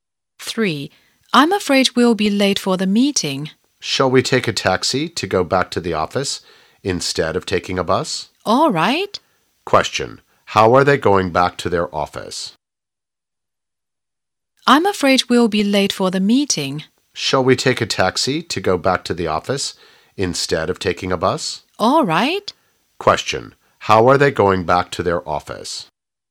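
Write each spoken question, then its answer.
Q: How are they going back to their office?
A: By taxi.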